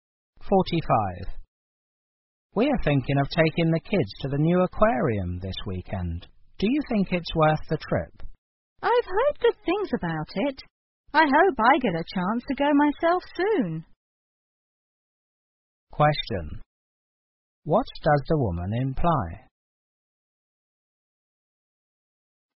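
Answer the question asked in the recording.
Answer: She hasn't been to the aquarium herself.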